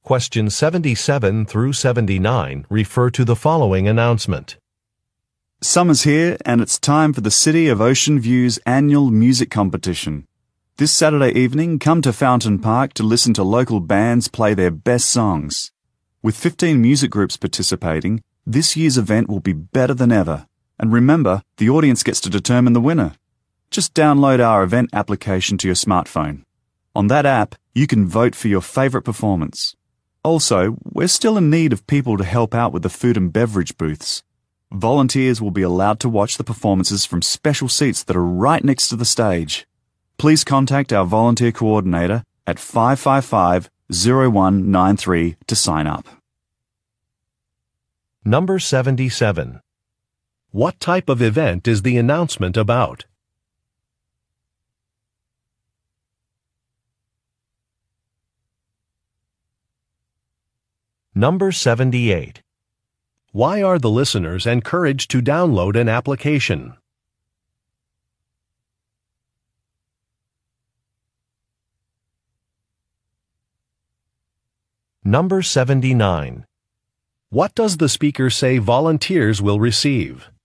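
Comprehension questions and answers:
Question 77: What type of event is the announcement about?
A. A music contest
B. A press conference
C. A food festival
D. A government election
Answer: A. A music contest

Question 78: Why are the listeners encouraged to download an application?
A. To look at a menu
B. To cast a vote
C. To get a map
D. To check a schedule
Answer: B. To cast a vote

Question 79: What does the speaker say volunteers will receive?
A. A water bottle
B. A meal coupon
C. Special seating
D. Free transportation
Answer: C. Special seating

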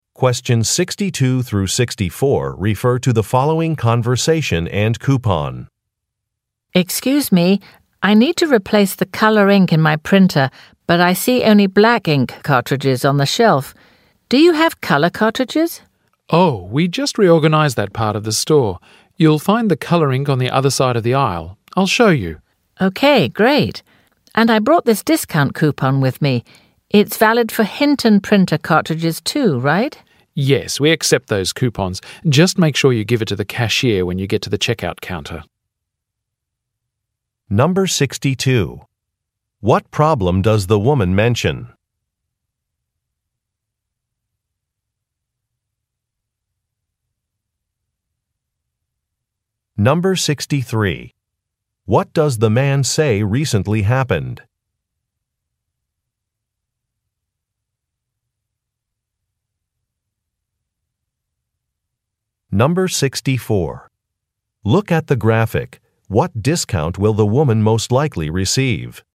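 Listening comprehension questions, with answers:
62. What problem does the woman mention?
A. An item she purchased is defective.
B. She cannot locate a product.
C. A sale price seems incorrect.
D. An expiration date has passed.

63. What does the man say recently happened?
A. Merchandise was rearranged.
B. Flyers were distributed.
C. An order was delayed.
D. A service was discontinued.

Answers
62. B. She cannot locate a product.
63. A. Merchandise was rearranged.

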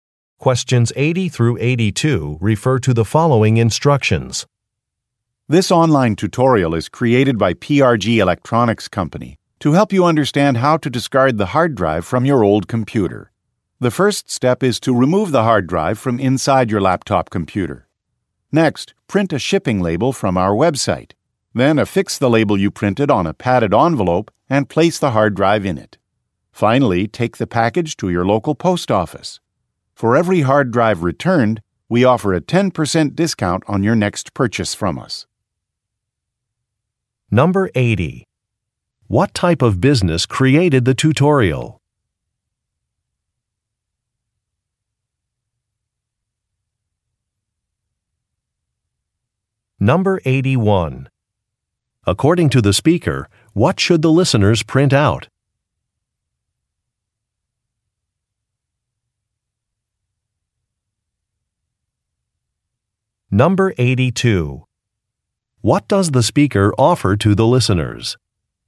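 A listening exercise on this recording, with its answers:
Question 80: What type of business created the tutorial?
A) A post office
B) A community college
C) An electronics company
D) A paper goods manufacturer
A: C) An electronics company

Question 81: According to the speaker, what should the listeners print out?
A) A shipping label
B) A manual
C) An invoice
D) Installation directions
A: A) A shipping label

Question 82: What does the speaker offer to the listeners?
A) A warranty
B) A discount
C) Free accessories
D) Express delivery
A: B) A discount

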